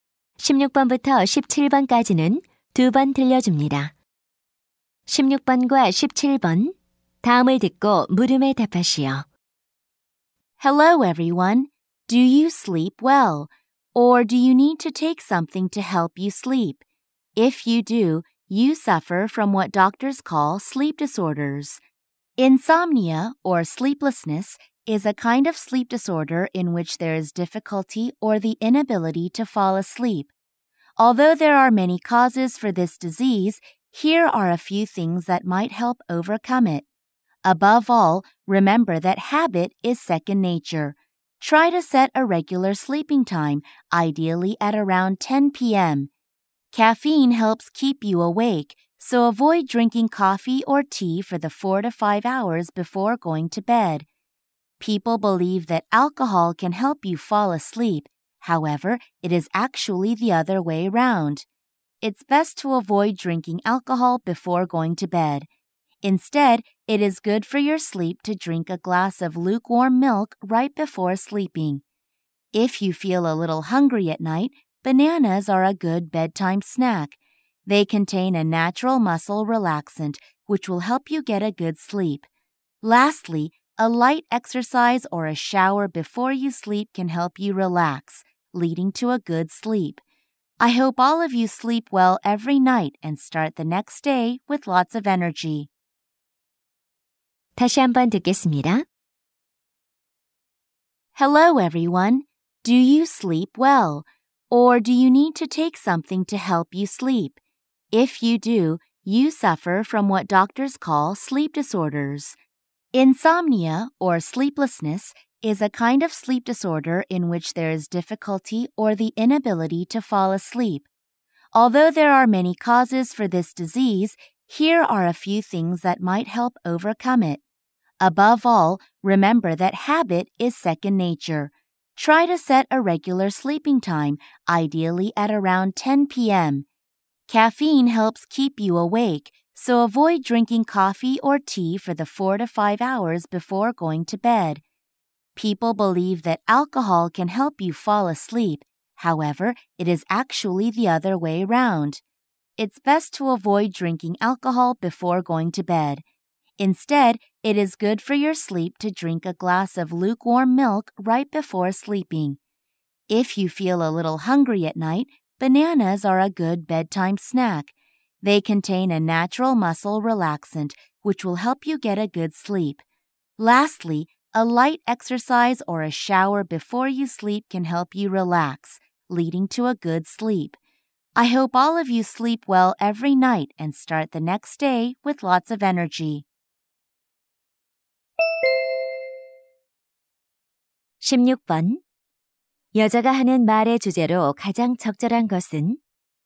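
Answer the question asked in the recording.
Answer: 불면증을 극복하는 방법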